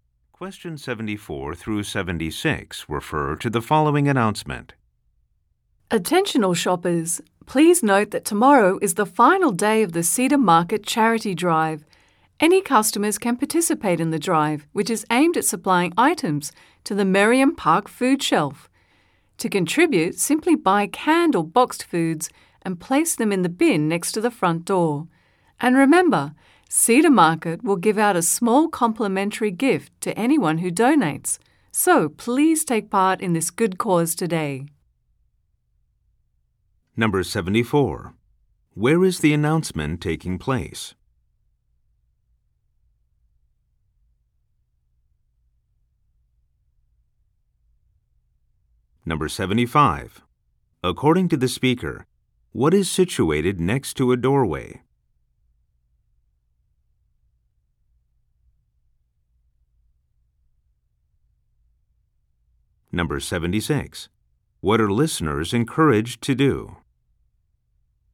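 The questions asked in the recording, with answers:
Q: Where is the announcement taking place?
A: At a store (Cedar Market)

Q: According to the speaker, what is situated next to a doorway?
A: A donation bin

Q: What are listeners encouraged to do?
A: Donate food to the charity drive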